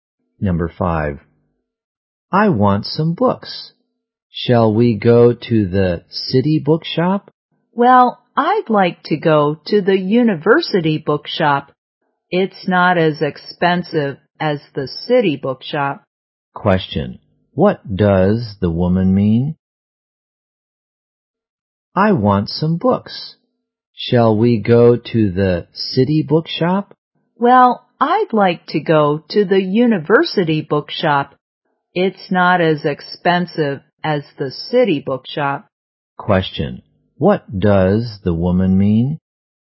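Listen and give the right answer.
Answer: She wants to go to the university bookshop because it's cheaper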